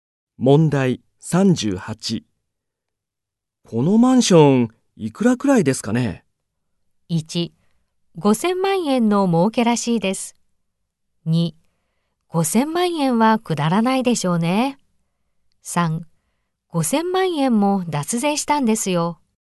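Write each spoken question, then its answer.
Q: このマンション、いくらくらいですかね?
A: 2: 5000万円はくだらないでしょうね。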